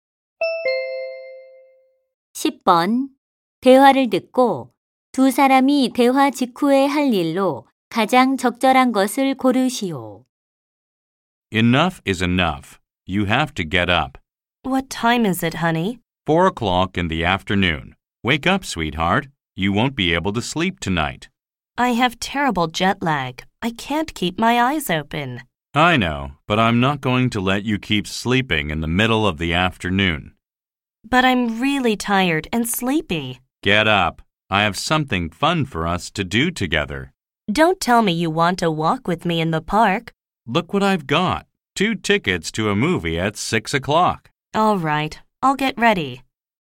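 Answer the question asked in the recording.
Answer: 영화 보러 갈 준비를 한다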